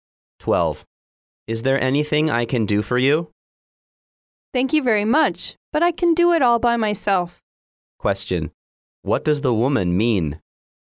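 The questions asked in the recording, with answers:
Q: What does the woman mean?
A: She doesn't need help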